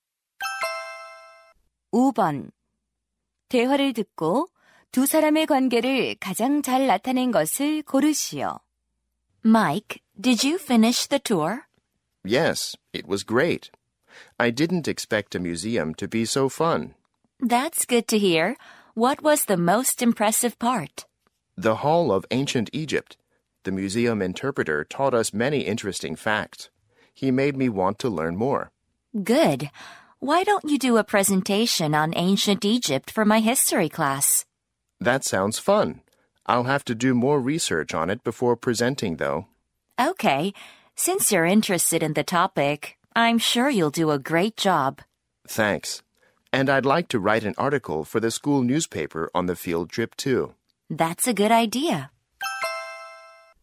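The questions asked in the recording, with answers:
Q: 대화를 듣고 두 사람의 관계를 가장 잘 나타낸 것을 고르시오.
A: 교사와 학생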